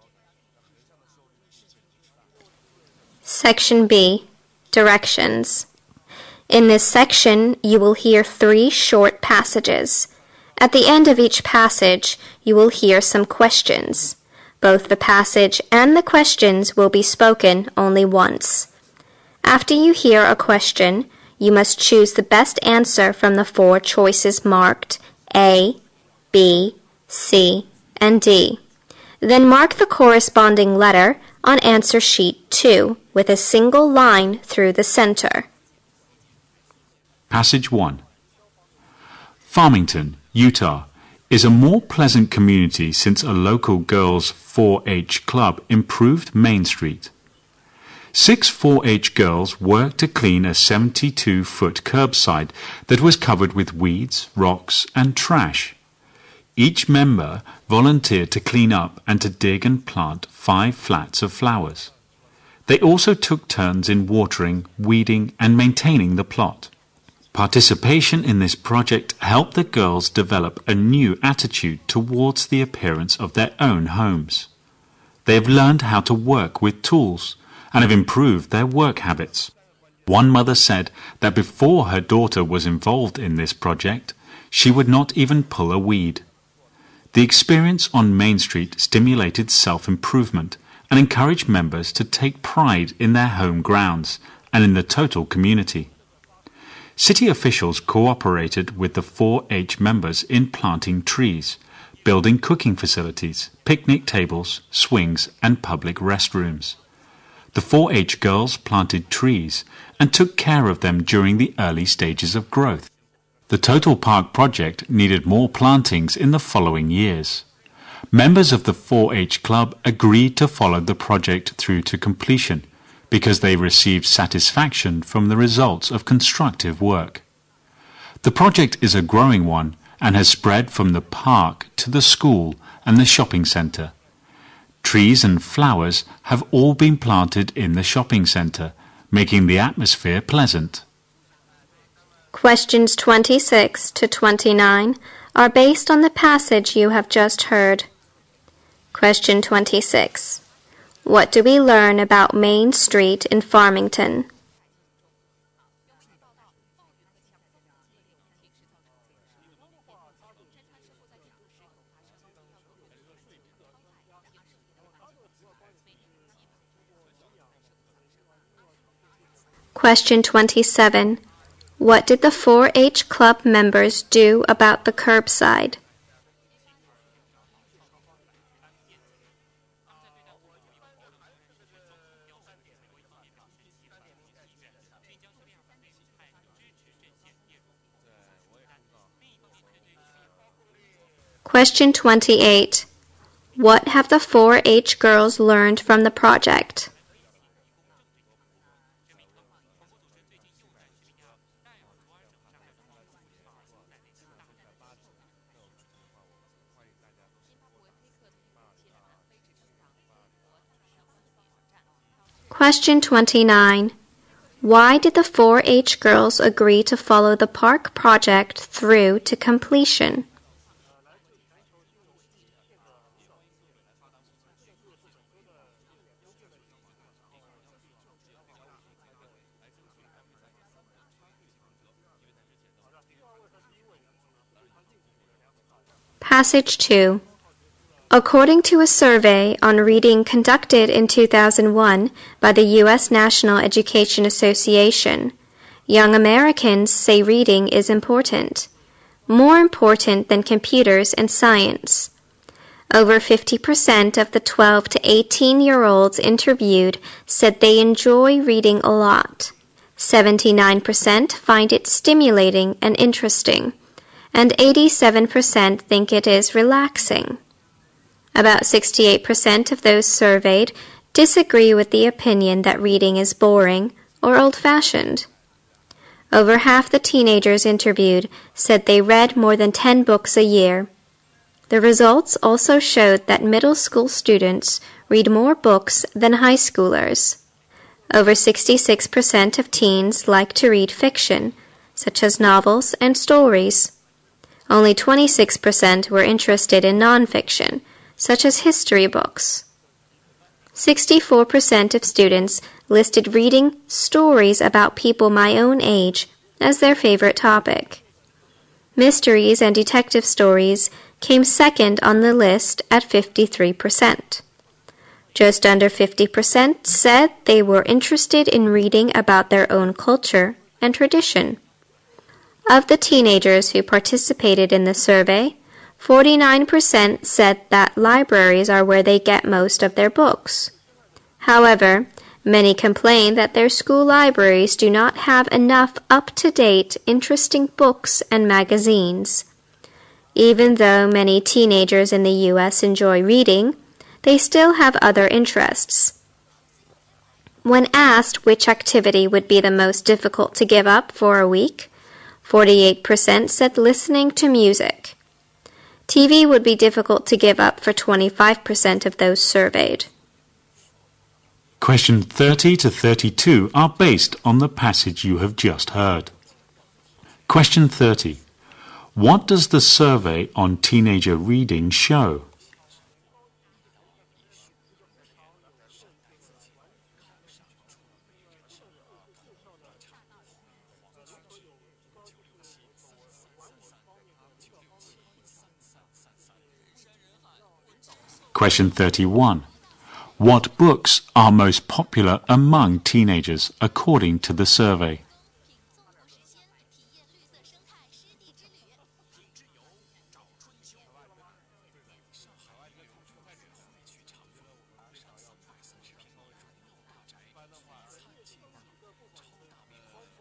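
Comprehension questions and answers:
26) What do we learn about Main Street in Farmington?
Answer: It has been improved by a local girls' 4-H club.

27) What do the 4-H club members do about the curbside?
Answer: They cleaned it and planted flowers.

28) What have the 4-H girls learned from the project?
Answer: How to work with tools; they improved their work habits.

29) Why do the 4-H girls agree to follow the park project through to complete.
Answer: They received satisfaction from the results of constructive work.

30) What does the survey on teenager reading show?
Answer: Young Americans think reading is important and enjoy it.

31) What books are most popular among teenagers according to the survey?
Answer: Fiction, especially stories about people their own age.

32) What activity do teenagers find the most difficult to give up for a week?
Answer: Listening to music.

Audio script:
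Passage 1
Farmington, Utah, is a more pleasant community since a local girls' 4-H club improved Main Street. Six 4-H girls worked to clean the 72 foot curbside that was covered with weeds, rocks and trash. Each member volunteered to clean up and to dig in plot, five flats of flowers. They also took terms in watering, weeding and maintaining the plot. Participation in this project helped the girls developed a new attitude towards their parents of their own homes; they've learned how to work with tools, and improve their work habits. One mother said that before her daughter was involved in this project, she would not even pour a weed. The experience on Main Street stimulated self-improvement, and encouraged members to take pride in their home grounds and the total community. City officials cooperated with the 4-H members in planting trees, building cooking facilities, pick-me tables, swings and public rest rooms. 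The 4-H girls planted trees and took care of them during the early stages of growth. The total park project needed more plantings in the following years. Members of the 4-H club agreed to follow the project through to completion, because they receive satisfaction from the results of constructive work. The project is a growing one and is spread from the park to the school and the shopping center. Trees and flowers have all been planted in the shopping center, making the atmosphere pleasant.
Questions 26 to 29 are based on the passage you have just heard.
Question 30 to 32 are based on the passage you have just heard.
Passage 2
According to a survey on reading conducted in 2001 by the U.S. National Education Association (NEA), young Americans say reading is important, more important than computers and science. Over 50% of the 12 to 18 years old interviewed say they enjoy reading a lot. 79% find it stimulating and interesting. 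And 87% think it is relaxing. About 68% of those surveyed disagreed with the opinion that reading is boring or old-fashioned.
Over half teenagers interviewed said they read more than ten books a year. The results also show that middle school students read more books than high schoolers. Over 66% of teens like to read fiction, such as novels and stories. Over 26% are interested in non-fiction, such history books.64% of students listed reading stories about people my own age. That's a favorite topic. Mysteries and detective stories came second on the list at 53%. Just under 50% said they were interested in reading about their own culture in tradition. Of the teenagers who participated in the survey, 49% said that libraries are where they get most of their books. However, many complain that their school libraries do not have enough up-to-date interesting books and magazines. Even though many teenagers in the US enjoy reading, they still have other interests. 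When asked which activity would be the most difficult to give up for a week, 48% said listening to music. TV would be difficult to give up for 25% of those surveyed.

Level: 英语四级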